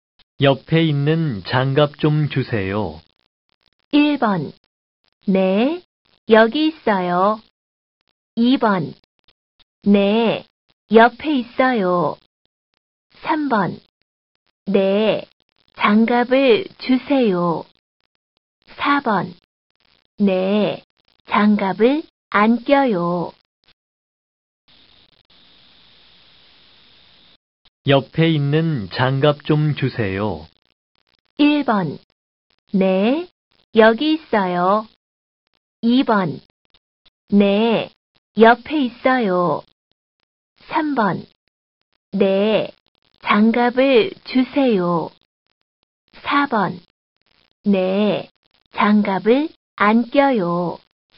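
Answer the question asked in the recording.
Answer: 1: 네, 여기 있어요.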